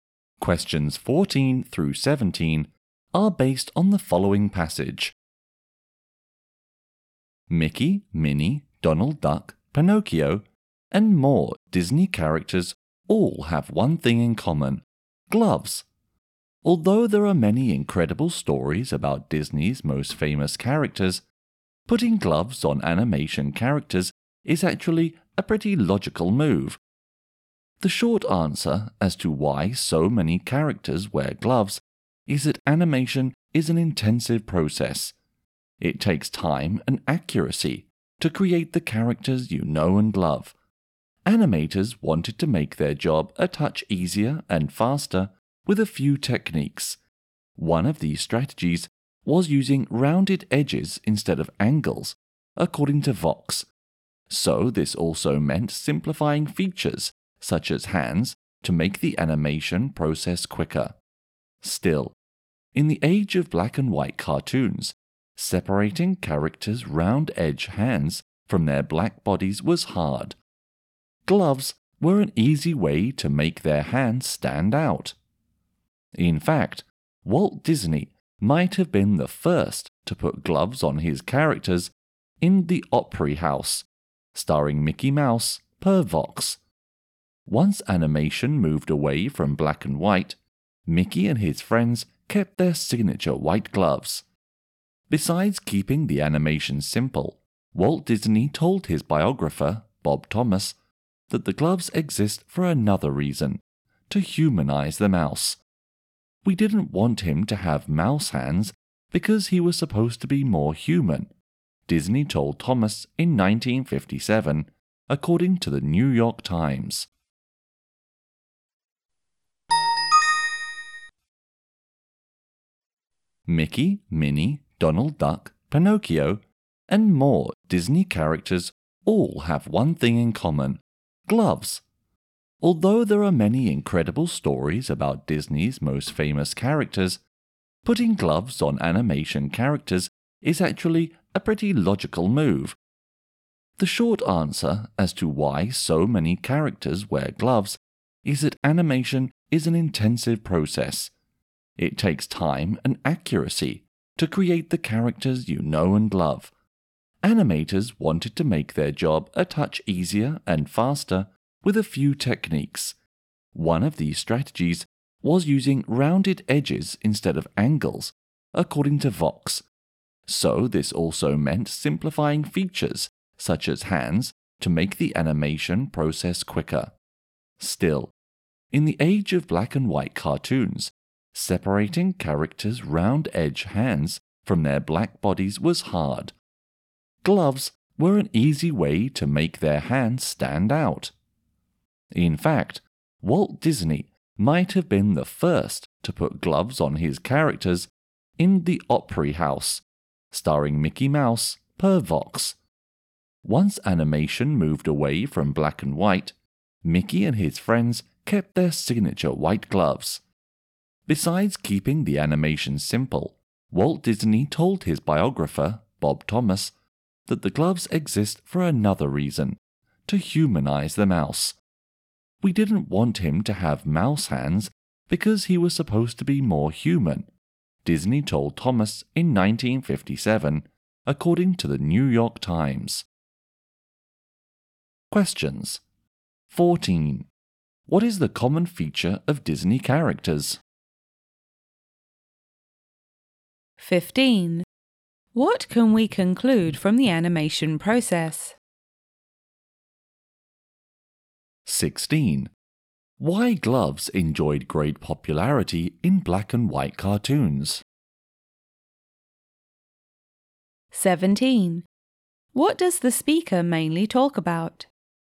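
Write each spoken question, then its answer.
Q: What is the common feature of Disney characters?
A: They all wear gloves

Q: Why gloves enjoyed great popularity in black and white cartoons?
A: They made the characters' hands stand out from their black bodies

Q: What does the speaker mainly talk about?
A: Why Disney characters wear gloves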